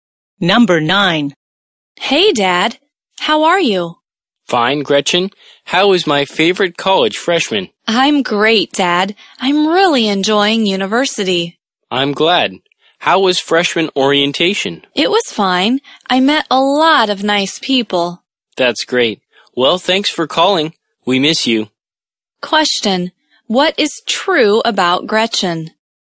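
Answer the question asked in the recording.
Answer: She is a college freshman who is enjoying university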